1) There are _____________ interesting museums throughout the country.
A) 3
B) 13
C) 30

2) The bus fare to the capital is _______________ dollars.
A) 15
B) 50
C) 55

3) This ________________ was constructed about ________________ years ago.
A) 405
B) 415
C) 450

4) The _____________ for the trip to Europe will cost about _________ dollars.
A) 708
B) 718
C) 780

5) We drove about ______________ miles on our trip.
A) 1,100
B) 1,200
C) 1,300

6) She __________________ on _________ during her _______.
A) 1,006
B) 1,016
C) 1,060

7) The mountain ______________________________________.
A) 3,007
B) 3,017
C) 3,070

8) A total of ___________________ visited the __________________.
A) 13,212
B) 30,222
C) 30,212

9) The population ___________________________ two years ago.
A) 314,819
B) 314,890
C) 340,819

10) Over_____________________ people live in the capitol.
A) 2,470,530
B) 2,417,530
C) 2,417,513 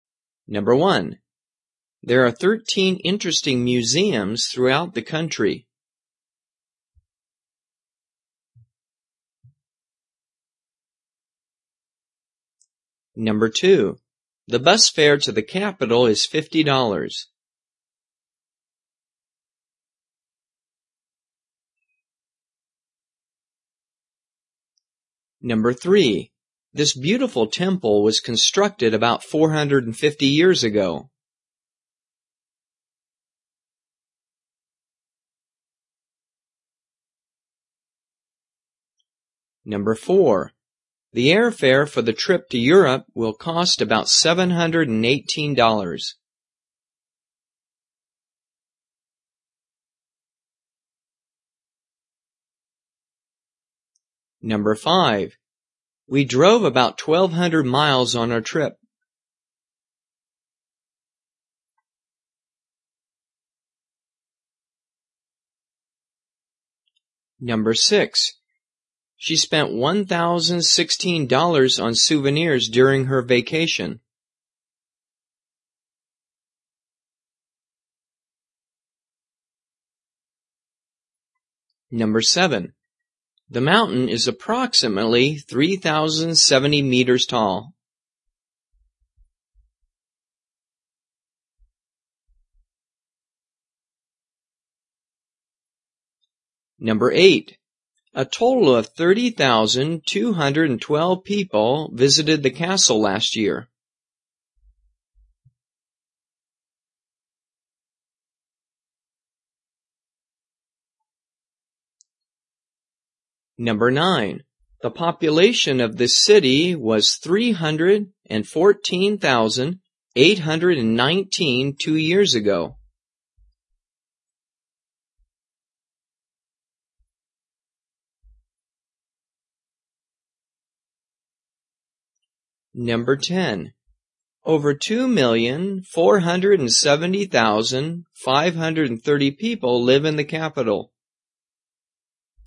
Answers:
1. B
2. B
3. C
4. B
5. B
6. B
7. C
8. C
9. A
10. A

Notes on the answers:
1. There are thirteen (13) interesting museums throughout the country.
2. The bus fare to the capital is fifty (50) dollars.
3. This beautiful temple was constructed about four hundred fifty (450) years ago.
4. The airfare for the trip to Europe will cost about seven hundred and eighteen (718) dollars.
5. We drove about twelve hundred (1,200) miles on our trip.
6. She spent one thousand sixteen (1,016) dollars on souvenirs during her trip.
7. The mountain is approximately three thousand seventy (3,070) meters tall.
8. A total of thirty thousand two hundred and twelve people (30,212) visited the castle last year.
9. The population of this city was three hundred and fourteen thousand eight hundred nineteen (314,819) two years ago.
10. Over two million four hundred and seventy thousand five hundred thirty (2,470,530) people live in the capital.

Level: 中级

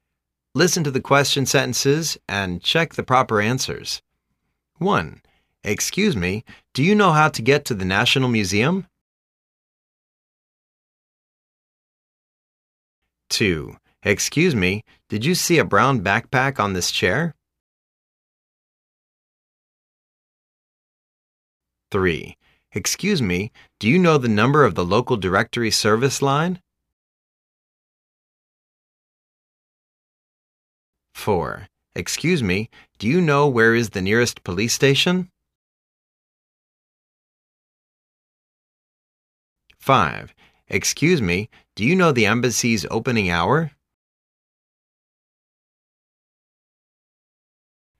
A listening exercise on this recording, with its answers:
Listen to the question sentences and check the proper answers.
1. Excuse me, do you know how to get to the national museum?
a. Take this recipe up to the fourth floor. The customer service counter is right at the corner.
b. Take this road for more two blocks until you see a cinema. lt's one building behind the cinema.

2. Excuse me, did you see a brown backpack on this chair?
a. No. When I sit in there's nothing on the chair.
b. No. When I sit in there's nothing in the air.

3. Excuse me, do you know the number of the local directory service line?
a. Yes. 114.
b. Yes. 11th floor.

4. Excuse me, do you know where is the nearest police station?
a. l'm sorry. l'm a teacher. I don't go to the police station.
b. l'm sorry. l'm a tourist. You could ask the bakery clerk.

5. Excuse me, do you know the embassy's opening hour?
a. I don't know. You can check on the notice board.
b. I don't know. You can ring the fire station.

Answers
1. b
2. a
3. a
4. b
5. a

